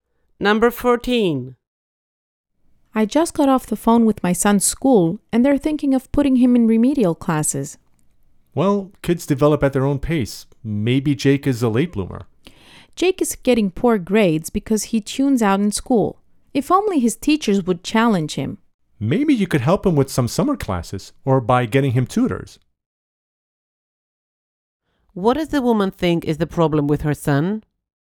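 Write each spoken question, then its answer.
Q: What does the woman think is the problem with her son?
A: His teachers don't challenge him, so he tunes out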